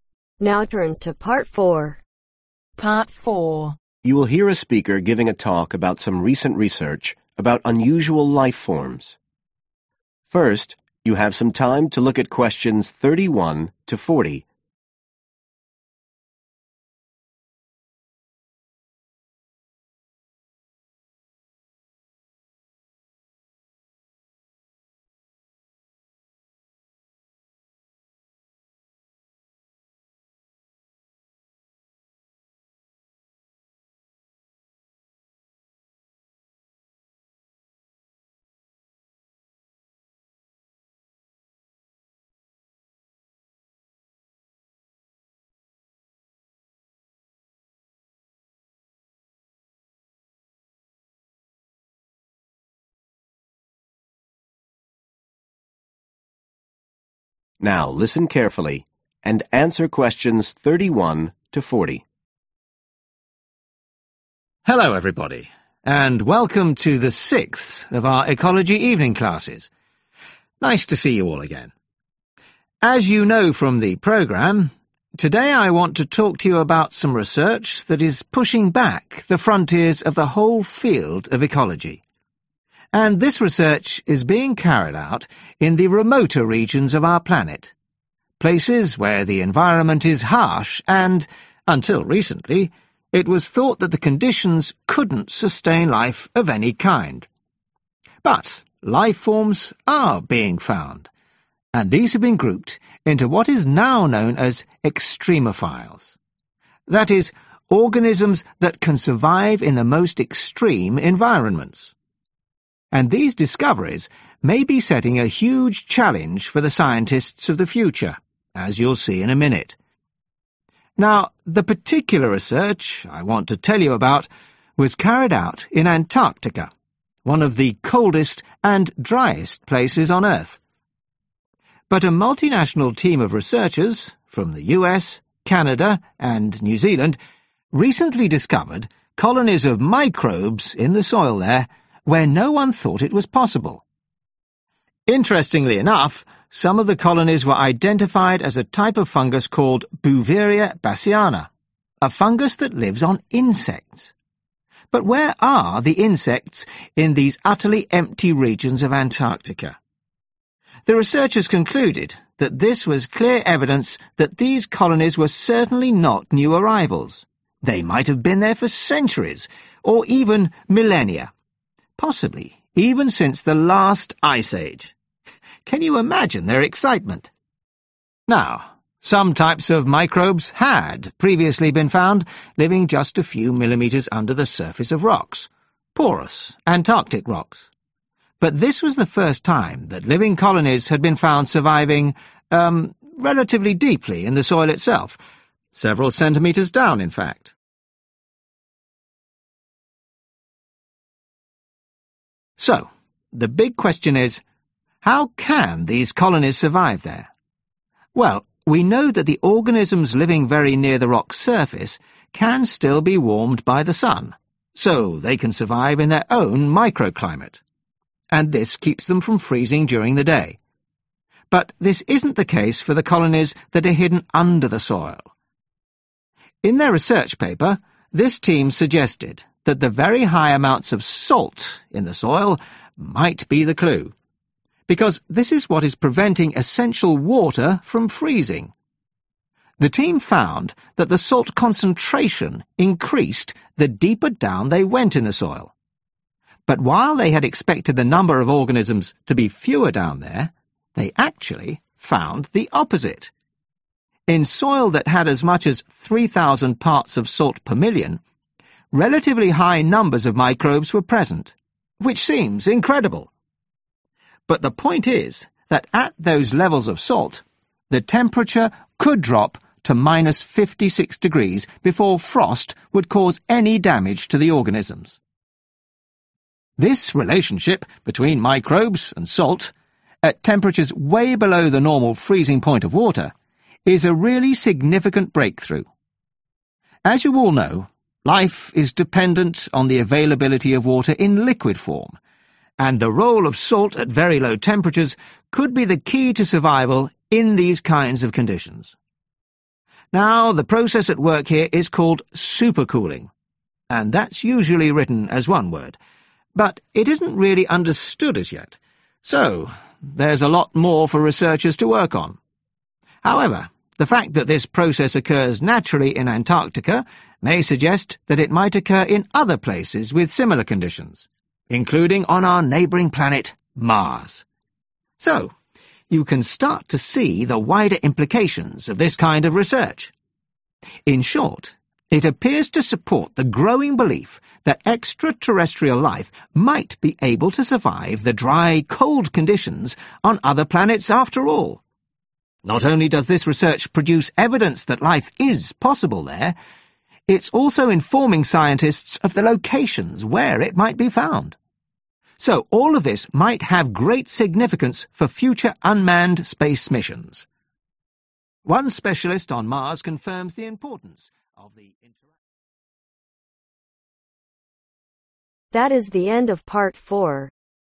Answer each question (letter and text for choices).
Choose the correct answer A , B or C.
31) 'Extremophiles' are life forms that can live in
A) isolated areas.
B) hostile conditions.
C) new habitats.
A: B) hostile conditions.

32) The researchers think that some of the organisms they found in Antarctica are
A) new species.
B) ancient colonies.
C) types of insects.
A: B) ancient colonies.

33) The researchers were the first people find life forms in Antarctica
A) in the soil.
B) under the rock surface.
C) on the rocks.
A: A) in the soil.

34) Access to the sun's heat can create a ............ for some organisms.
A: Microclimate

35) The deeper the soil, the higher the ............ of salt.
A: Concentration

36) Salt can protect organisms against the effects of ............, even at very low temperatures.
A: Frost

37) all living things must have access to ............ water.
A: Liquid

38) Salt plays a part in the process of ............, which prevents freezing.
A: Super cooling

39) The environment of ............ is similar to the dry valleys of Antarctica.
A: Mars

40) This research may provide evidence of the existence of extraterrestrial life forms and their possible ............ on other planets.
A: Locations